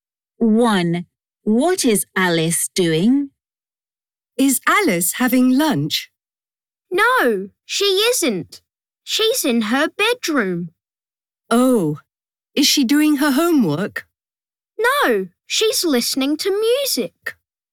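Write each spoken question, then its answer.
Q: What is Alice doing?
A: She's listening to music.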